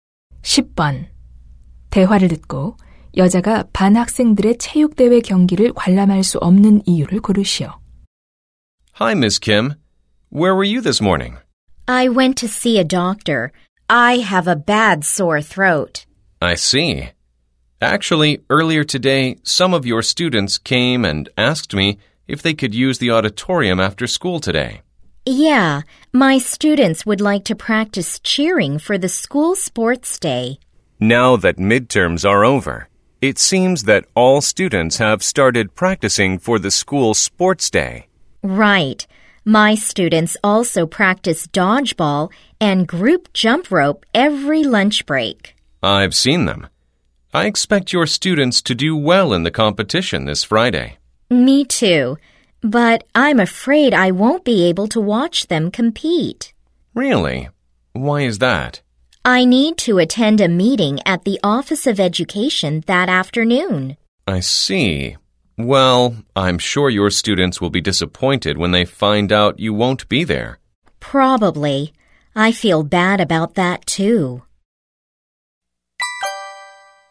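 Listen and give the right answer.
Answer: 교육청 회의에 참석해야 해서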